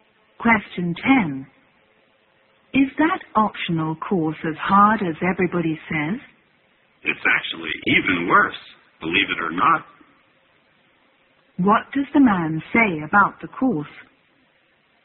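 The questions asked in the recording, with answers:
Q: What does the man say about the course?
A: It is even harder than everybody says.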